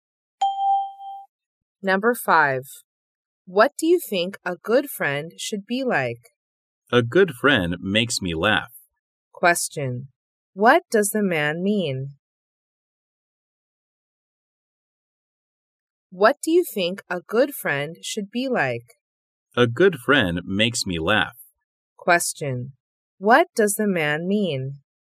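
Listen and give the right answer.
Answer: A good friend should make him laugh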